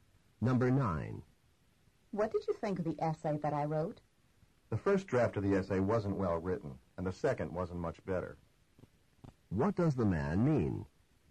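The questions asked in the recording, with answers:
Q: What does the man mean?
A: Both drafts were poorly written.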